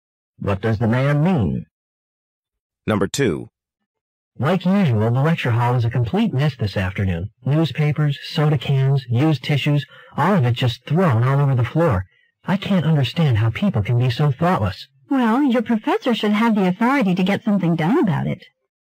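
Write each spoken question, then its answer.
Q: What does the woman imply the man should do?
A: Ask his professor to do something about the mess.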